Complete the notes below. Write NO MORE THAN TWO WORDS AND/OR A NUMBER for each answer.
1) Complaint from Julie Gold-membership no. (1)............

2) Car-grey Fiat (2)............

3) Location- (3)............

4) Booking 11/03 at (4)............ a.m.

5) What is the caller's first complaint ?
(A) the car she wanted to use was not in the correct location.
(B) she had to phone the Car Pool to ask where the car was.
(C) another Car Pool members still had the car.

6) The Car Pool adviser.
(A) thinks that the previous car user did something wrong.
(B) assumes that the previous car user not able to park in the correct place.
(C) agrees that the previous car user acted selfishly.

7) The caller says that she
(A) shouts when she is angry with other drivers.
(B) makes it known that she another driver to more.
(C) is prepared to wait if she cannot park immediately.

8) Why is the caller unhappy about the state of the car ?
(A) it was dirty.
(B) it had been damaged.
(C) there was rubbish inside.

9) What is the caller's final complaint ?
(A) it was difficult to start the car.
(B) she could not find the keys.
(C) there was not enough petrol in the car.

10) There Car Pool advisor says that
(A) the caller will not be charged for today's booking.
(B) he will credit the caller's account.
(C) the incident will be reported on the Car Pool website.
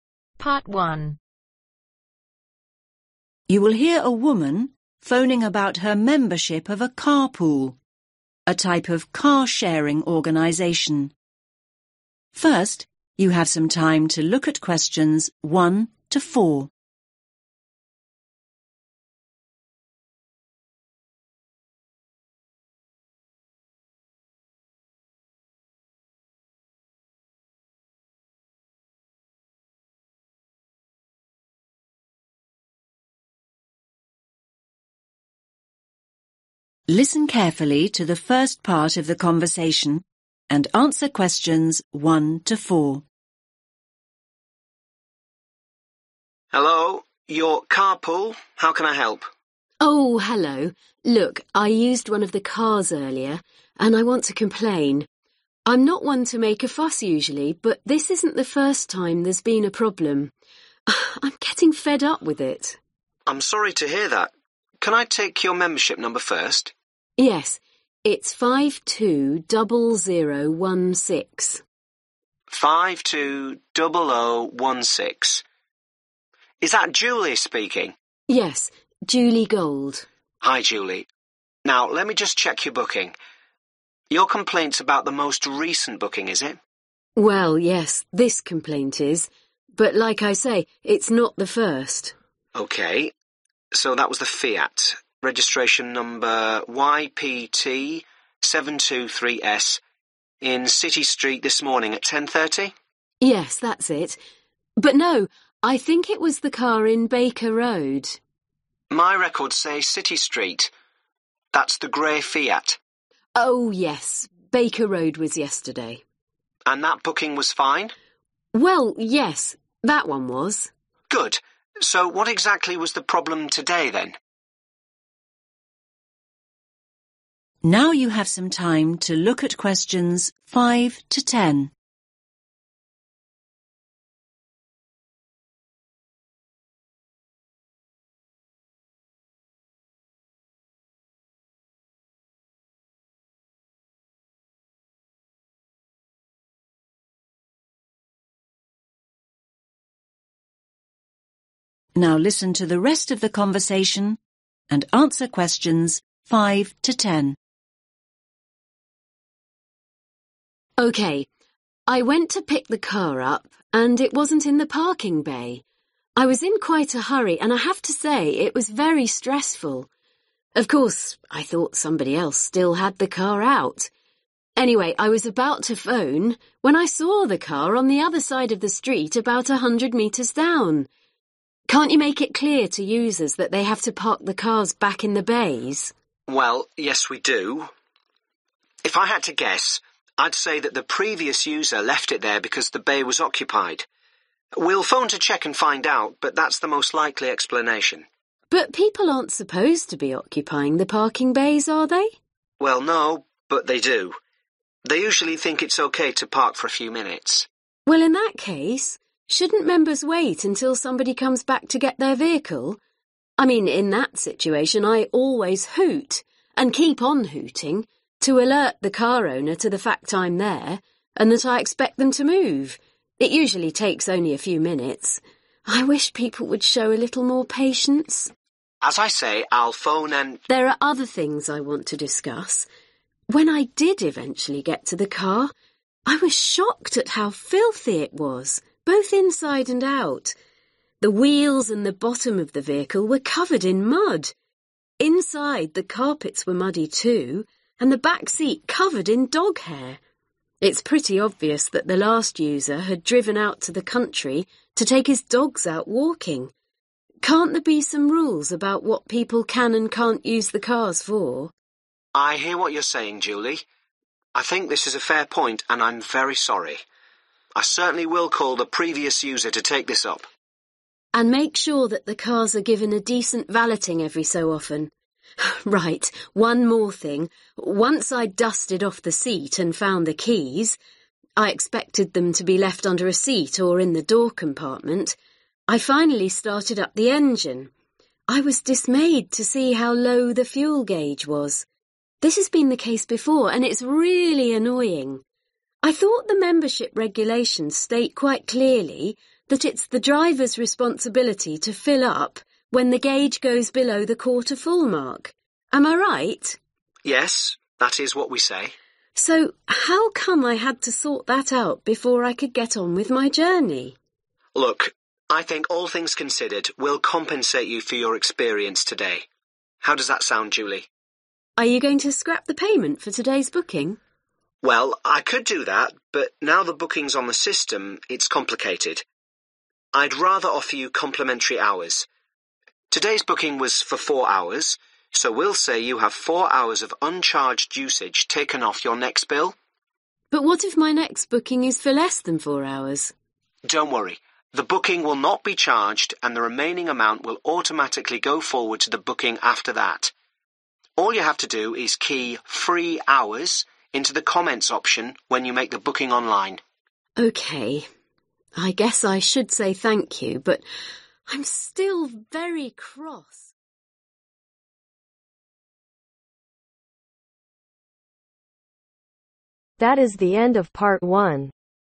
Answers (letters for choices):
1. 520016
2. YPT723S
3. City Street
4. 10.30
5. A
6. B
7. B
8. A
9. C
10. B